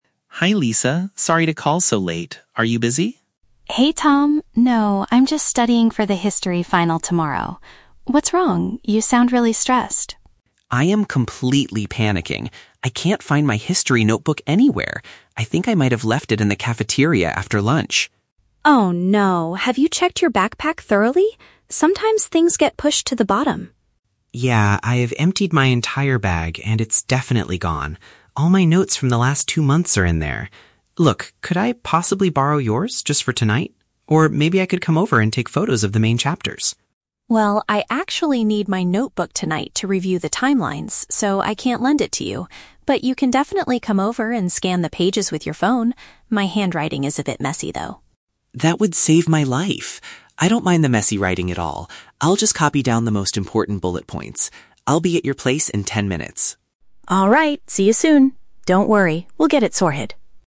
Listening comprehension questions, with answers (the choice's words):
Listen to a phone call between two classmates and choose the correct answer (A, B, or C) for each question.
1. Why is Tom calling Lisa so late?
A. He wants to invite her to get some food at the cafeteria.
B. He misplaced his personal study materials for an upcoming test.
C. He needs someone to help him clean out his messy backpack.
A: He misplaced his personal study materials for an upcoming test.

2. Where does Tom suspect he accidentally left his item?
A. At the bottom of his backpack.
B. In the history classroom.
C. In the school dining area.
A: In the school dining area.

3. How do they agree to solve Tom's problem?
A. Tom will go to Lisa's house and capture images of her notes.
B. Tom will borrow Lisa's notebook and take it to his own house.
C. Lisa will read all the important timelines to Tom over the phone.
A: Tom will go to Lisa's house and capture images of her notes.

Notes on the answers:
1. Tom says, "I can't find my history notebook anywhere." Option B perfectly paraphrases "can't find" as "misplaced" and "notebook" as "study materials." Option A is a trap; the word "cafeteria" is mentioned, but he left his book there, he isn't inviting her to eat. Option C is a trap; he mentions emptying his bag, but he doesn't need help cleaning it.
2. Tom states, "I think I might have left it in the cafeteria after lunch." Option C paraphrases "cafeteria" as "school dining area." Option A is a trap; Lisa asks if he checked the bottom of his backpack, but Tom confirms it is "definitely gone" from there. Option B is plausible since it's a history notebook, but it is not mentioned.
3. Tom asks to "take photos" and Lisa agrees that he can "come over and scan the pages with your phone." Option A paraphrases this perfectly as going to her house and capturing images. Option B is a trap; Tom asks to borrow the notebook, but Lisa rejects this idea ("I actually need my notebook tonight... so I can't lend it to you"). Option C is not mentioned at all.

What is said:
Tom: Hi Lisa, sorry to call so late. Are you busy?
Lisa: Hey Tom, no, I'm just studying for the history final tomorrow. What's wrong? You sound really stressed.
Tom: I am completely panicking. I can't find my history notebook anywhere. I think I might have left it in the cafeteria after lunch.
Lisa: Oh no! Have you checked your backpack thoroughly? Sometimes things get pushed to the bottom.
Tom: Yeah, I've emptied my entire bag, and it's definitely gone. All my notes from the last two months are in there. Look, could I possibly borrow yours just for tonight? Or maybe I could come over and take photos of the main chapters?
Lisa: Well, I actually need my notebook tonight to review the timelines, so I can't lend it to you. But you can definitely come over and scan the pages with your phone. My handwriting is a bit messy, though.
Tom: That would save my life! I don't mind the messy writing at all. I'll just copy down the most important bullet points. I'll be at your place in ten minutes.